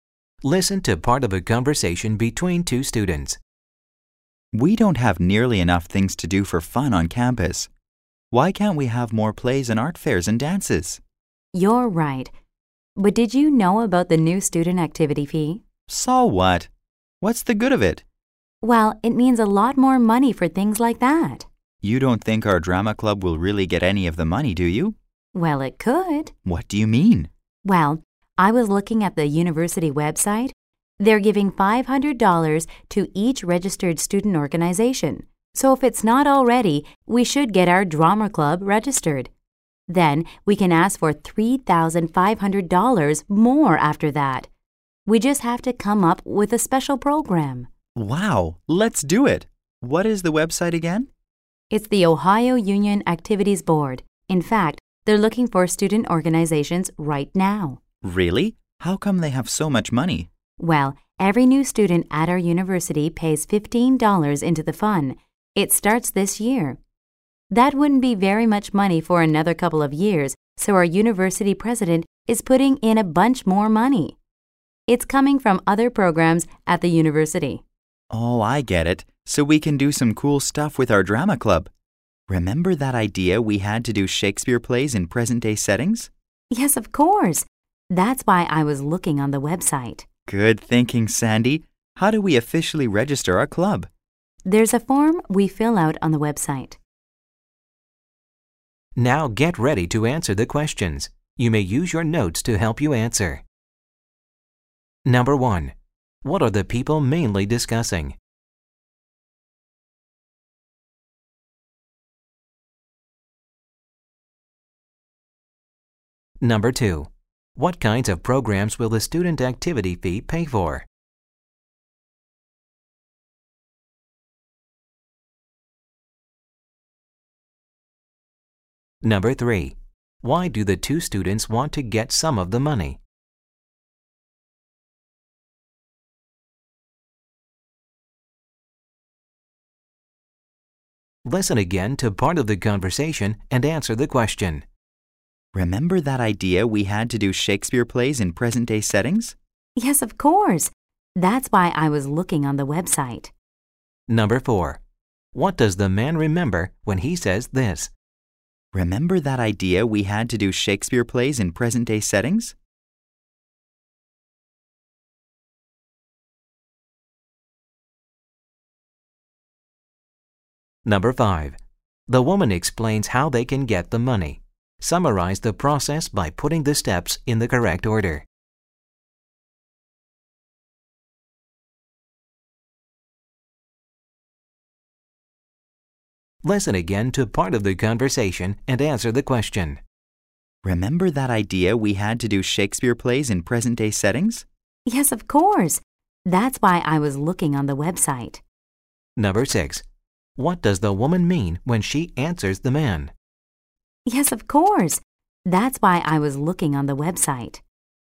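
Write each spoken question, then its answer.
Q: What are the people mainly discussing?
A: Getting money for their drama club from the new student activity fee

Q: What kinds of programs will the student activity fee pay for?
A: Fun campus activities such as plays, art fairs and dances run by student organizations

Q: Why do the two students want to get some of the money?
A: To put on Shakespeare plays in present-day settings with their drama club

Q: What does the man remember when he says this?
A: Their idea of doing Shakespeare plays in present-day settings

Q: What does the woman mean when she answers the man?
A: She was already thinking of that idea and looked at the website to fund it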